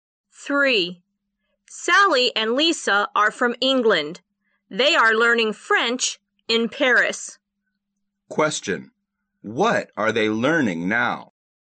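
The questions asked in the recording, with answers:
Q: What are they learning now?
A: French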